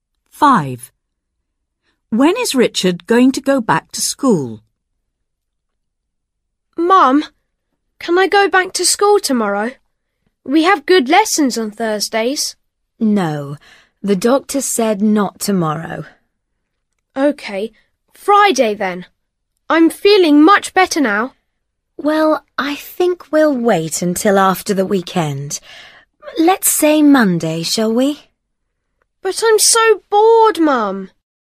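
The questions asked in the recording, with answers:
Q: When is Richard going to go back to school?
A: On Monday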